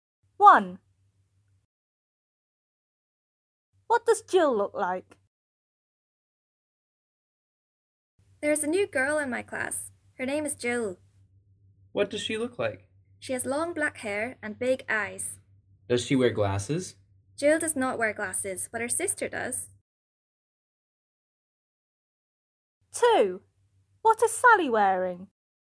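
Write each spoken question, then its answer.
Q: What does Jill look like?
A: She has long black hair and big eyes and does not wear glasses.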